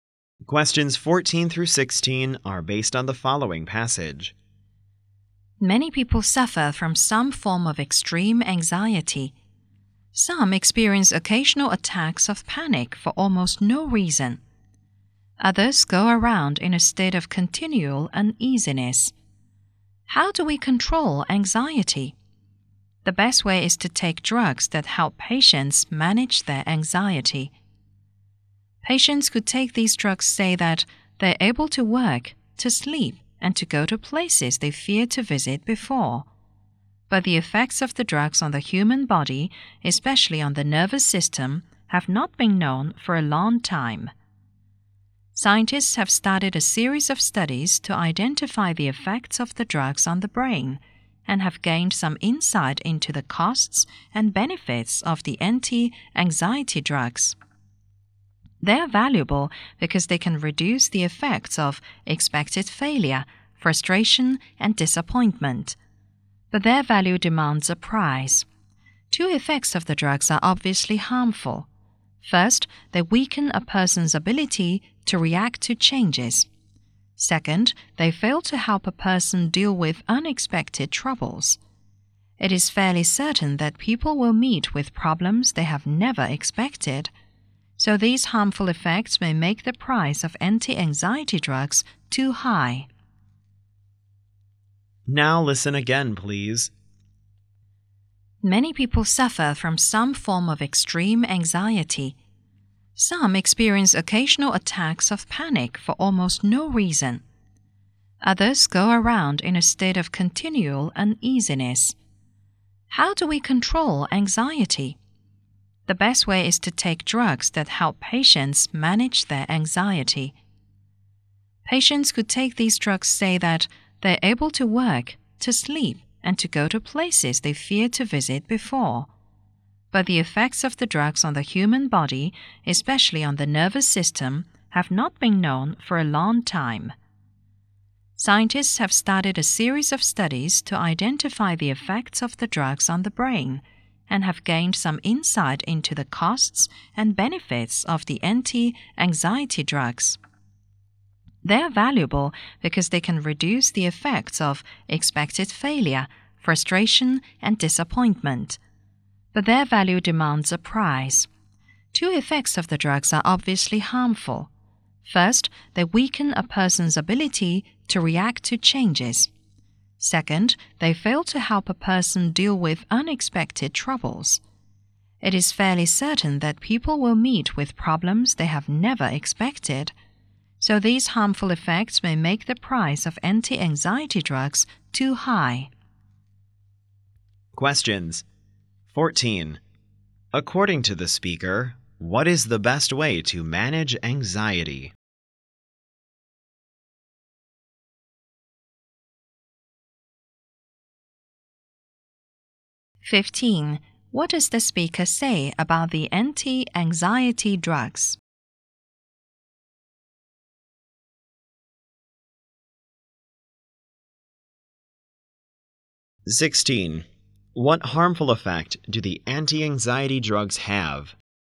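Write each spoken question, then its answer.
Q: According to the speaker, what is the best way to manage anxiety?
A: Taking anti-anxiety drugs

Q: What harmful effect do the anti-anxiety drugs have?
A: They weaken a person's ability to react to changes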